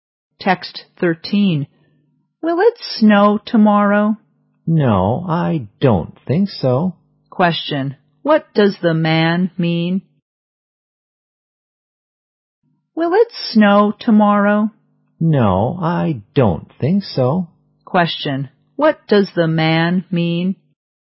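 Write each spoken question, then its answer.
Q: Question, what does the man mean?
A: He doesn't think it will snow tomorrow.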